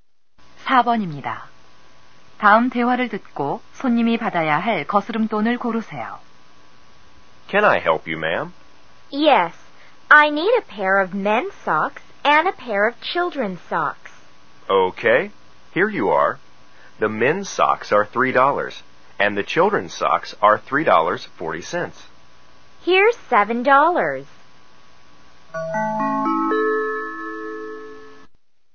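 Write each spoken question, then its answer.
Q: 다음 대화를 듣고 손님이 받아야 할 거스름 돈을 고르세요.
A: 60센트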